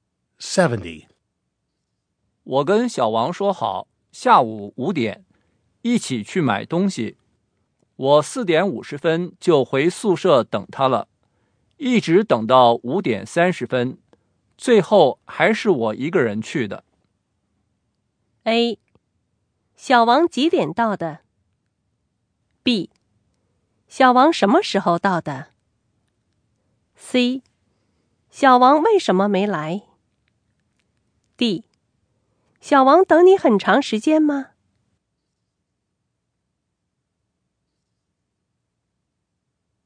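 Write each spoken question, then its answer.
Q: 我跟小王说好,下午5点,一起去买东西。我4:50就回宿舍等他了,一直等到5:30,最后还是我一个人去的。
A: C: 小王为什么没来?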